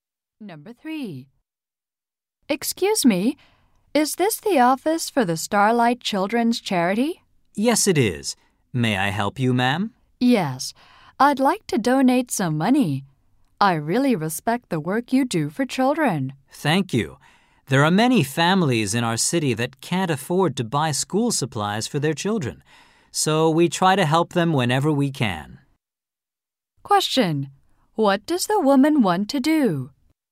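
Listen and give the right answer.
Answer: Donate money to the children's charity.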